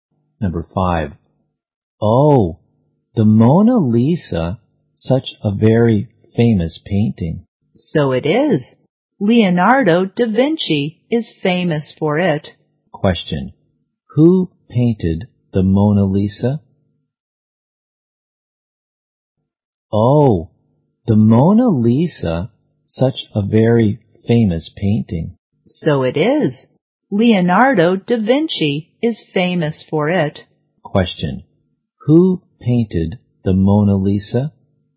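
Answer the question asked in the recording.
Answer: Leonardo da Vinci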